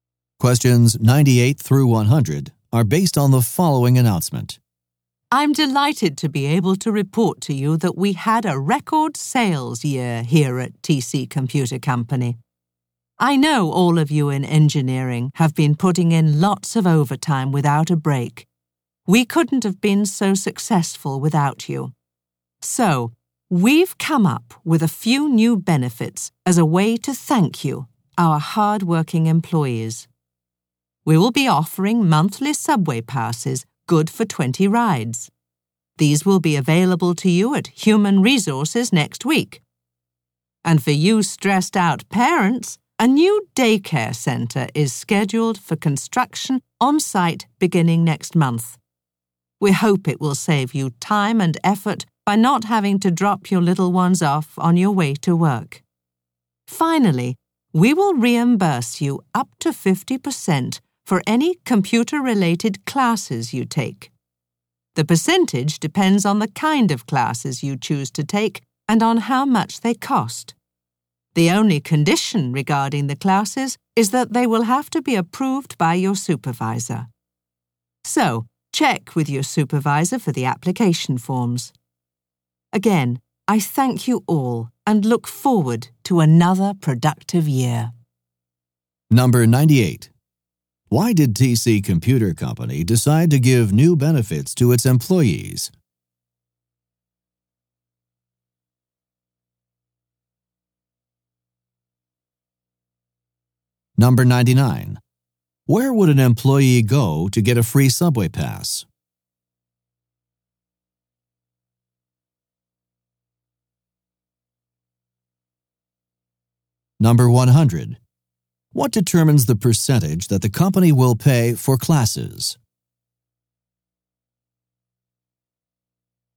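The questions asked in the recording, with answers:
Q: Why did TC Computer Company decide to give new benefits to its employees?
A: To thank employees for their hard work in a record sales year

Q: Where would an employee go to get a free subway pass?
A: Human Resources

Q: What determines the percentage that the company will pay for classes?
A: The kind of classes and how much they cost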